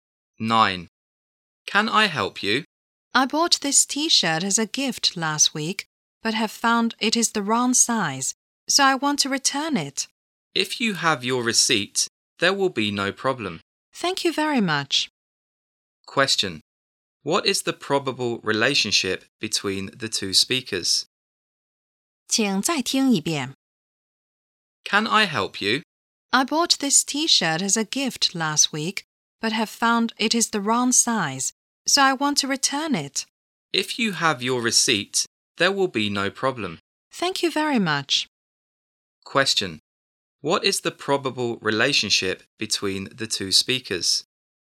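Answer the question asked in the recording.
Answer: Shop assistant and customer.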